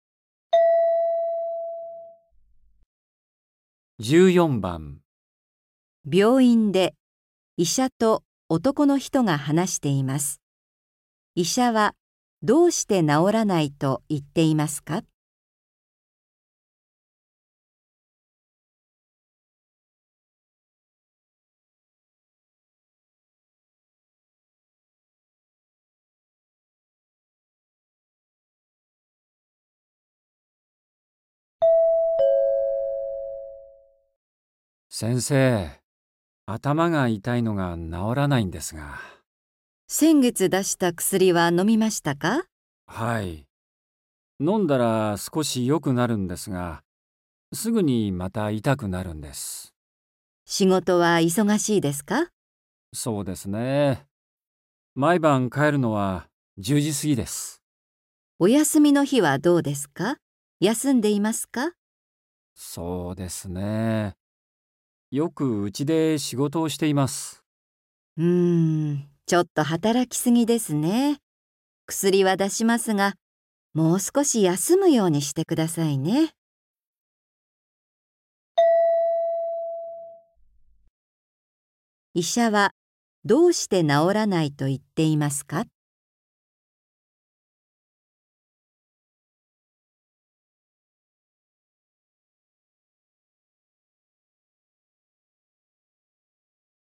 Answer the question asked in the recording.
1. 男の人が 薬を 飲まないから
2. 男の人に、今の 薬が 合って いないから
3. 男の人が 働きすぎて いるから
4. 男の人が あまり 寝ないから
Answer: 3. 男の人が 働きすぎて いるから

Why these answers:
F:うーん。ちょっと働きすぎですね。薬は出しますが、もう少し休むようにしてください。

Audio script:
病院で、医者と男の人が話しています。医者は、どうして治らないと言っていますか。
F:先月出した薬は飲みましたか。
M:はい。飲んだら少し良くなるんですが、すぐにまた痛くなるんです。
F:仕事は忙しいですか。
M:そうですね...。毎晩帰るのは10時すぎです。
F:お休みの日はどうですか。休んでいますか。
M:そうですね...。よくうちで仕事をしています。
F:うーん。ちょっと働きすぎですね。薬は出しますが、もう少し休むようにしてください。

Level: 初級